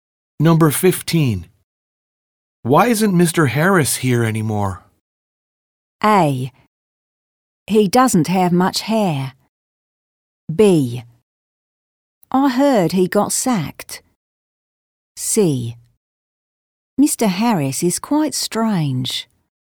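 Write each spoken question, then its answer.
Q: Why isn't Mr. Harris here anymore?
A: B: I heard he got sacked.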